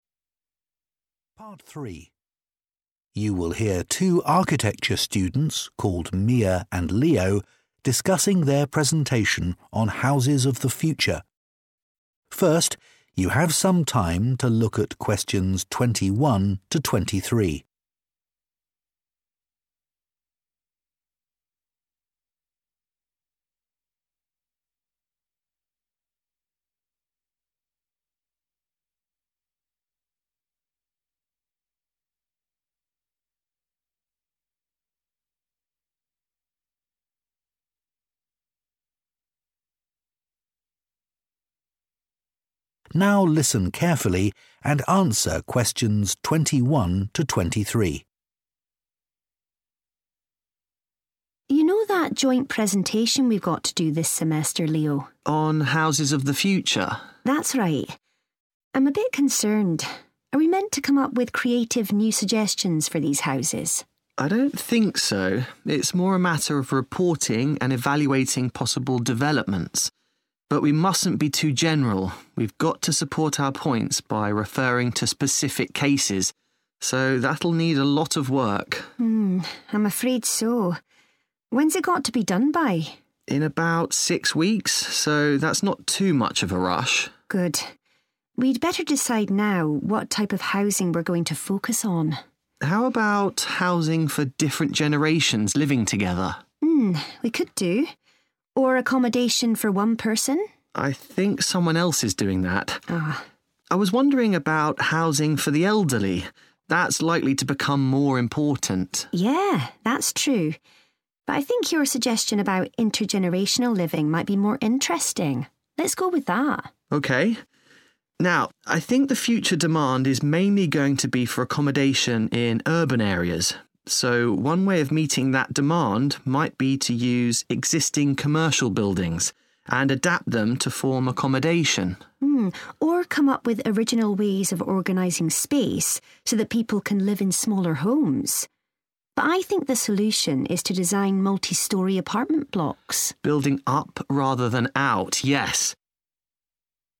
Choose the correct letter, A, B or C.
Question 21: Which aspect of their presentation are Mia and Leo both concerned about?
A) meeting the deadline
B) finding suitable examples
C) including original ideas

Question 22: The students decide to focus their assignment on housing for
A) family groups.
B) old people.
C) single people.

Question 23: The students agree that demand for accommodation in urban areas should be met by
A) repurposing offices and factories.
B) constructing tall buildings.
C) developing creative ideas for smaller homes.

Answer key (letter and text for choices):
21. B) finding suitable examples
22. A) family groups.
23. B) constructing tall buildings.

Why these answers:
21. Leo nhấn mạnh bài thuyết trình không được quá chung chung mà phải chứng minh các luận điểm bằng cách dẫn ra những trường hợp cụ thể, và việc này sẽ tốn rất nhiều công sức => Mia đồng tình => Việc tìm các trường hợp cụ thể này chính là tìm kiếm các ví dụ phù hợp => Do đó, cả hai bạn đều đang lo lắng về khía cạnh này
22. Leo băn khoăn về việc làm nhà ở cho người già, Mia thấy cũng đúng nhưng cô ấy chốt lại là gợi ý của Leo về việc các thế hệ sống chung với nhau có vẻ thú vị hơn – hãy chọn cái đó. Cụm từ "intergenerational living" (nhiều thế hệ sống chung) đồng nghĩa với "family groups".
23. Cụm từ "multi-storey apartment blocks" (chung cư nhiều tầng) đồng nghĩa với "constructing tall buildings" (xây dựng các tòa nhà cao tầng) => Leo đồng ý => Cả hai bạn cùng đồng thuận với giải pháp này => Chọn B.

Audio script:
Mia: You know that joint presentation we've got to do this semester, Leo?
I'm a bit concerned. Are we meant to come up with creative new suggestions for these houses?
Leo: I don't think so. It's more a matter of reporting and evaluating possible developments. But we mustn't be too general. We've got to support our points by referring to specific cases, so that'll need a lot of work.
Mia: Mm, I'm afraid so. When's it got to be done by?
Leo: In about six weeks, so that's not too much of a rush.
Mia: Good. We'd better decide now what type of housing we're going to focus on.
Leo: How about housing for different generations living together?
Mia: Mm, we could do. Or accommodation for one person?
Leo: I think someone else is doing that.
Mia: Ah.
Leo: I was wondering about housing for the elderly. That's likely to become more important.
Mia: Yeah, that's true. But I think your suggestion about intergenerational living might be more interesting. Let's go with that.
Now, I think the future demand is mainly going to be for accommodation in urban areas. So, one way of meeting that demand might be to use existing commercial buildings and adapt them to form accommodation.
Mia: Mm, or come up with original ways of organizing space so that people can live in smaller homes. But I think the solution is to design multi-story apartment blocks.
Leo: Building up rather than out, yes.